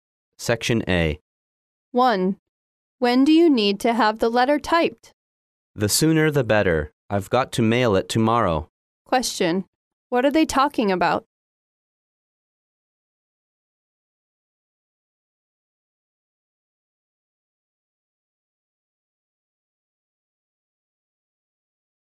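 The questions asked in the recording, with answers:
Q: What are they talking about?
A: Typing a letter that must be mailed tomorrow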